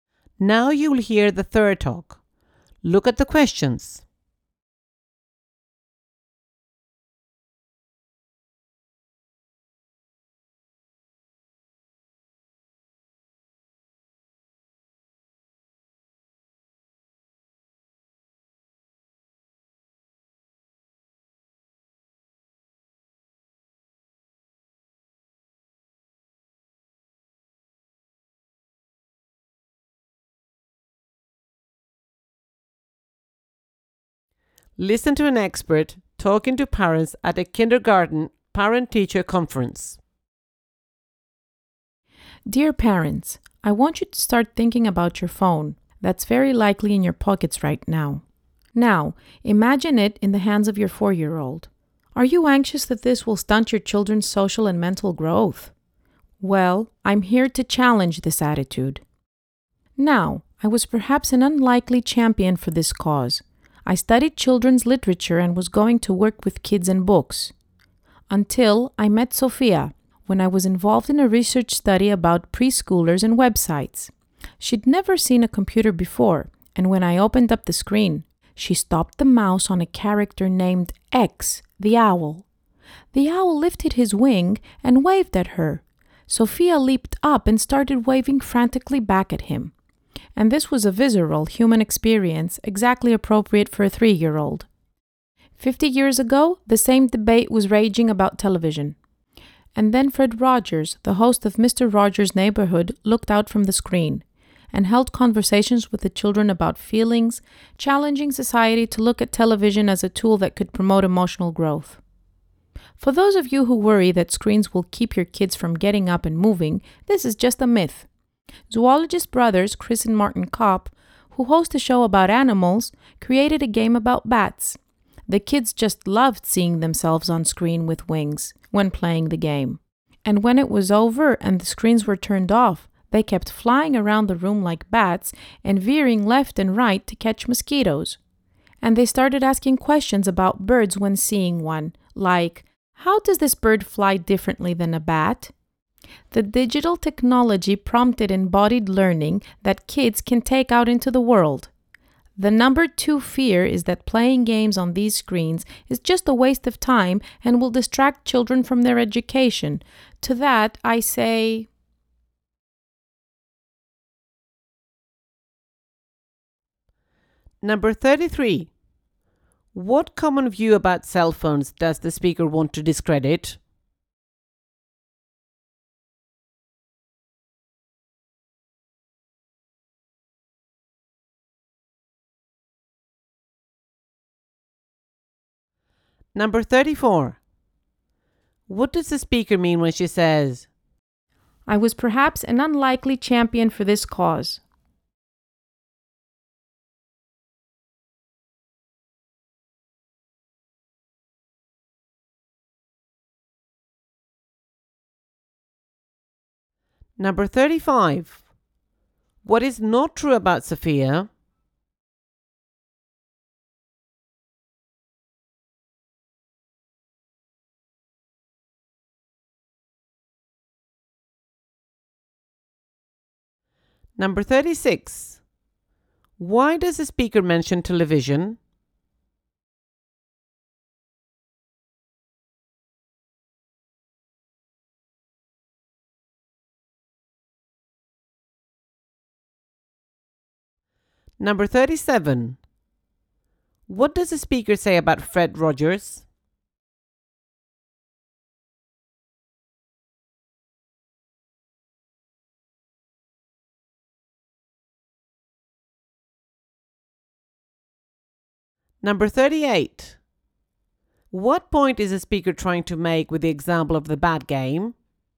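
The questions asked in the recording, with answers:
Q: What common view about cell phones does the speaker want to discredit?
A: That phones will stunt children's social and mental growth

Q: What does the speaker mean when she says,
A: Her background was children's literature and books, not technology

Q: Why does the speaker mention television?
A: The same debate happened 50 years ago, and TV proved it could promote emotional growth

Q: What does the speaker say about Fred Rogers?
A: He talked with children about feelings from the screen, showing TV could promote emotional growth

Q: What point is the speaker trying to make with the example of the bad game?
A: Screens don't keep kids from moving; they can prompt physical, embodied learning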